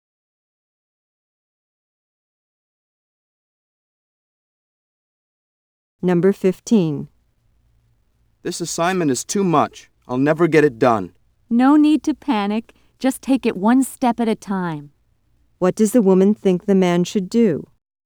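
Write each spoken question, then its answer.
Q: What does the woman think the man should do?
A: Work on the assignment one step at a time.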